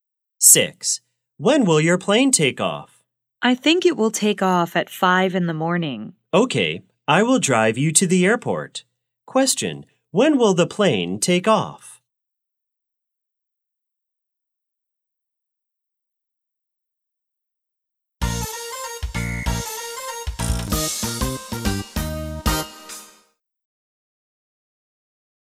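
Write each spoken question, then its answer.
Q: Question, when will the plane take off?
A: At 5 in the morning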